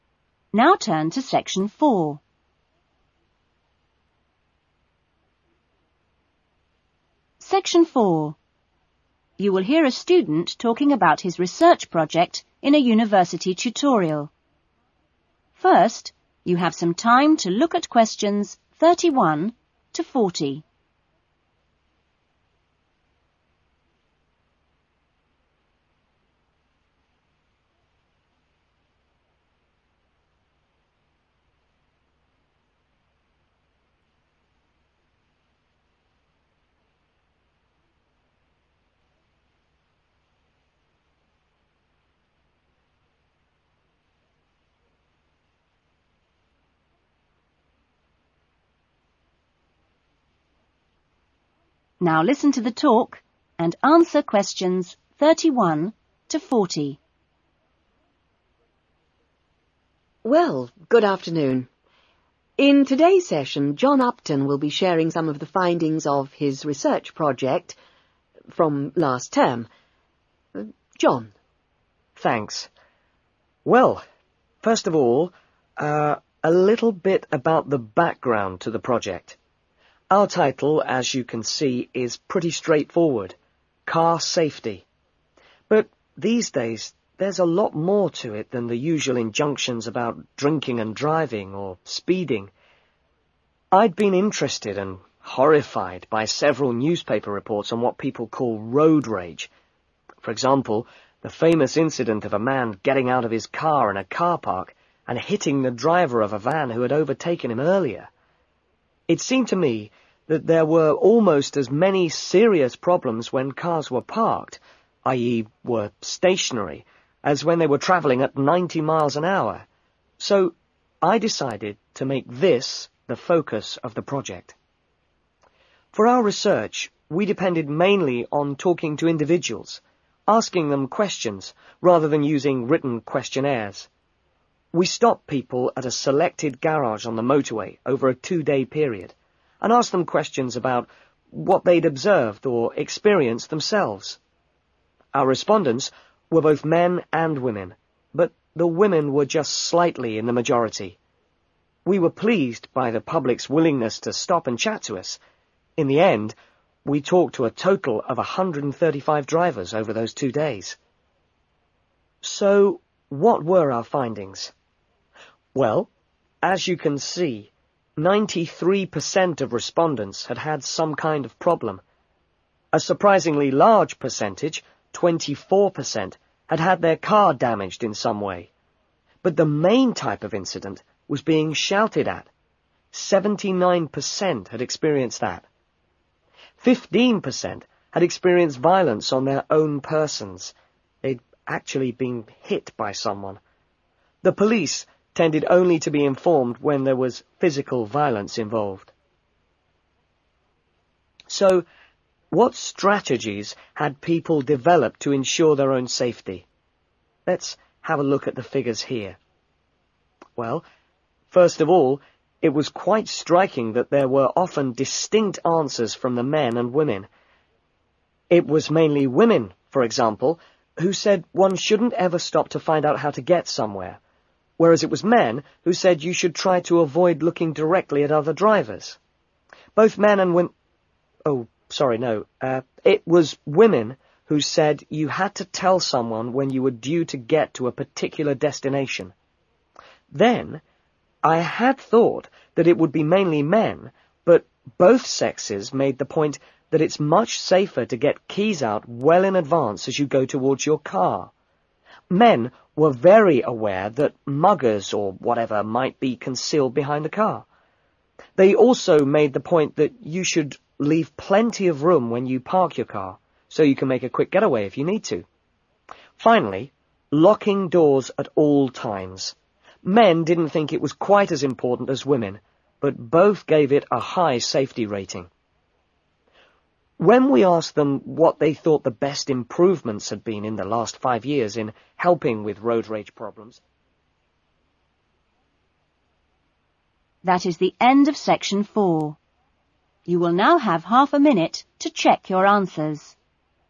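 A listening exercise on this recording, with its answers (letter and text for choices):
Circle the correct letters A-C.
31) John was first interested in the subject because of something...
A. he had witnessed.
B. he had read about.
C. he had experienced.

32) The main research method was...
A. interviews.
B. questionnaires.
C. observation.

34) How many respondents were there?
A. 50-100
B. 100-150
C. 150-200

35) The most common type of road rage incident involved...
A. damage to property.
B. personal violence.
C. verbal abuse.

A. mainly women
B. mainly men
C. both men and women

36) Avoid eye contact with other drivers.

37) Inform someone of your likely arrival time.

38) Ensure car keys are ready when you return to the car.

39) Leave plenty of space when parking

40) Keep all doors locked.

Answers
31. B. he had read about.
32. A. interviews.
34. B. 100-150
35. C. verbal abuse.
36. 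B. mainly men
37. A. mainly women
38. C. both men and women
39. B. mainly men
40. C. both men and women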